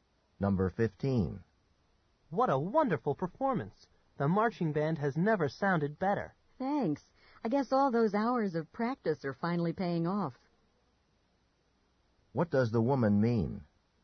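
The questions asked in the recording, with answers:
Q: What does the woman mean?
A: The band's practice has paid off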